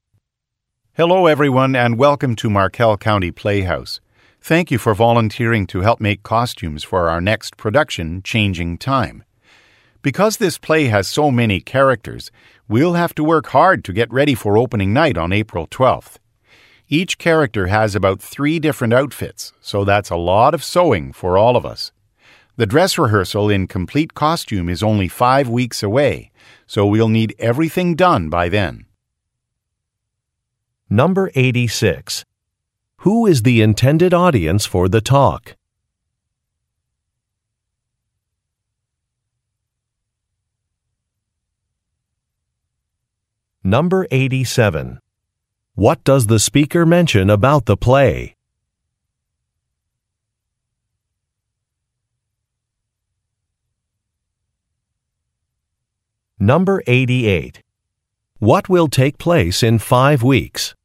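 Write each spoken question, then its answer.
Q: Who is the intended audience for the talk?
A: Volunteers who will make costumes

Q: What does the speaker mention about the play?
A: It has many characters

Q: What will take place in 5 weeks?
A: A dress rehearsal in complete costume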